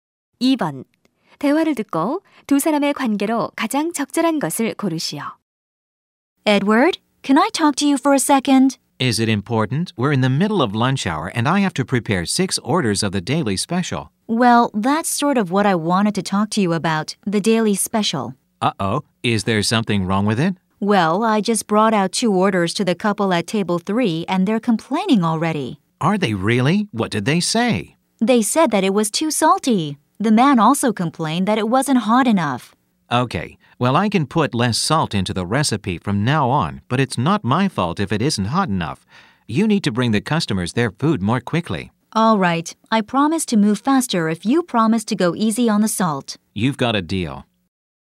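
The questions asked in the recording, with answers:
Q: 대화를 듣고 두 사람의 관계로 가장 적절한 것을 고르시오.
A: 종업원과 요리사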